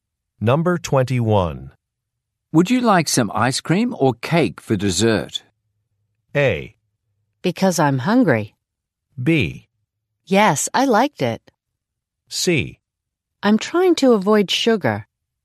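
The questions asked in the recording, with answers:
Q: Would you like some ice cream or cake for dessert?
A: C: I'm trying to avoid sugar.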